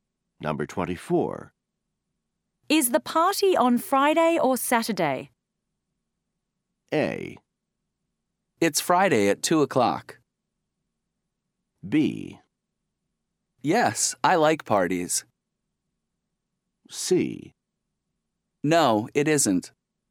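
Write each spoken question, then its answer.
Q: Is the party on Friday or Saturday?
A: A: It's Friday at 2 o'clock.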